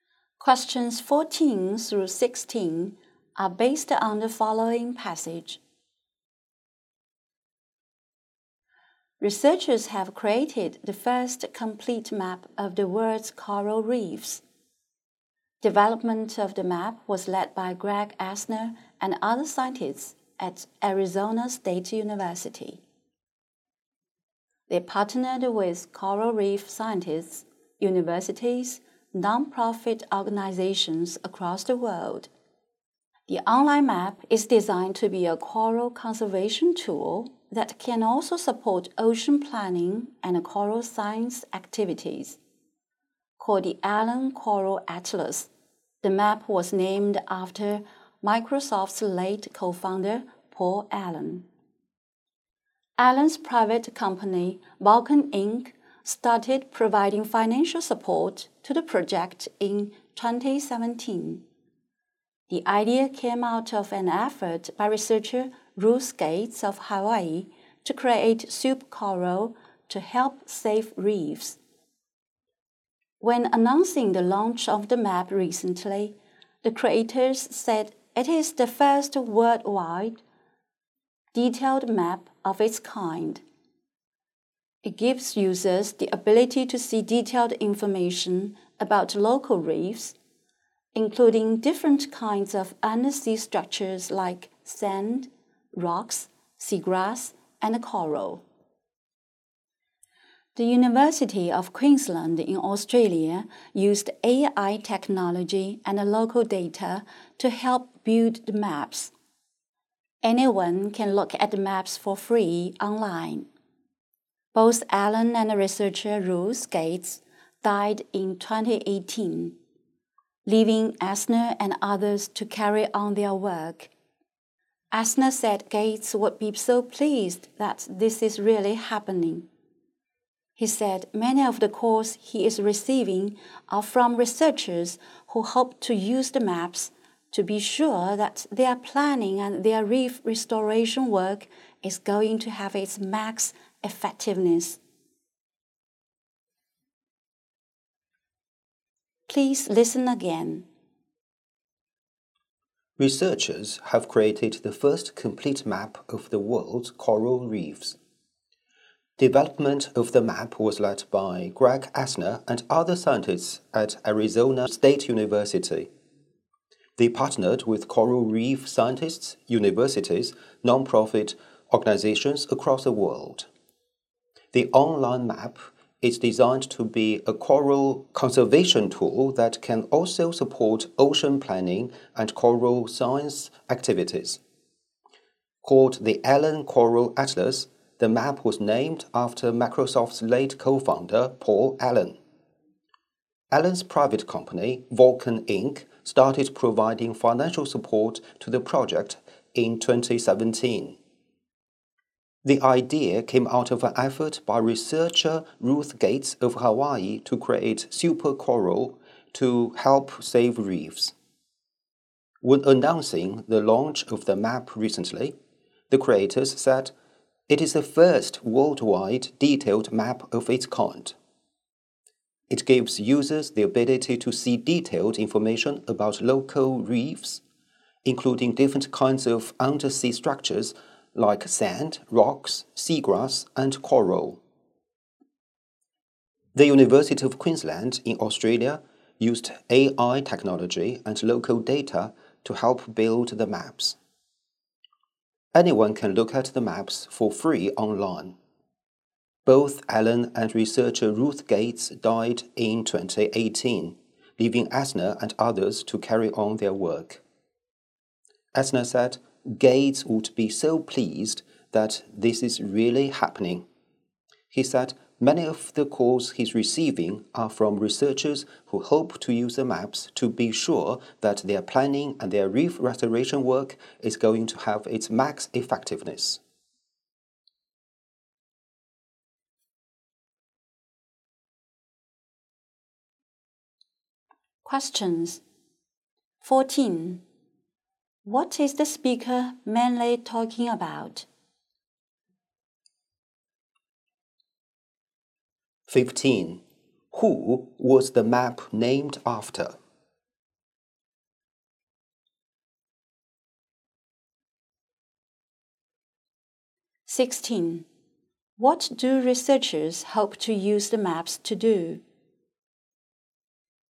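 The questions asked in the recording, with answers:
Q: What is the speaker mainly talking about?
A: The first complete map of the world's coral reefs

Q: Who was the map named after?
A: Paul Allen, Microsoft's late co-founder

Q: What do researchers hope to use the maps to do?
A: Make their planning and reef restoration work as effective as possible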